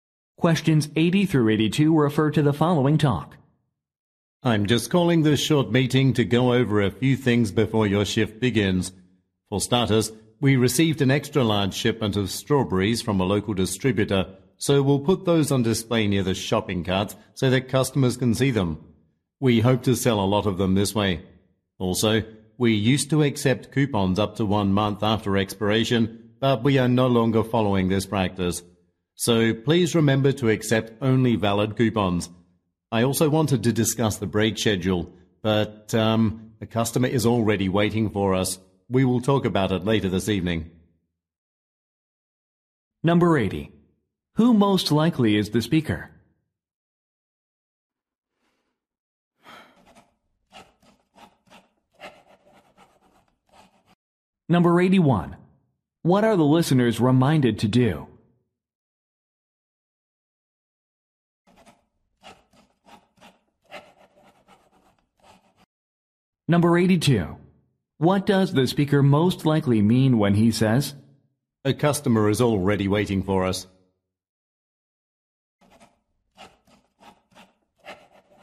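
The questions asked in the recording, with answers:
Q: What are the listeners reminded to do?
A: Accept only valid coupons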